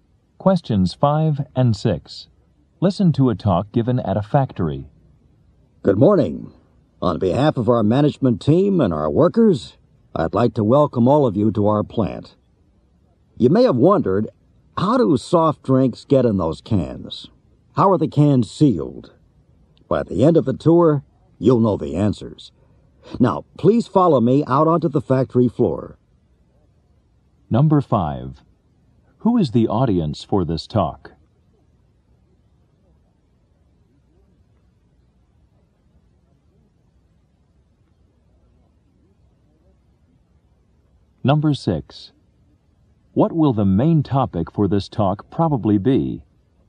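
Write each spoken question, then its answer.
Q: Who is the audience for this talk?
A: Visitors touring the soft drink factory

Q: What will the main topic for this talk probably be?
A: How soft drinks are canned and sealed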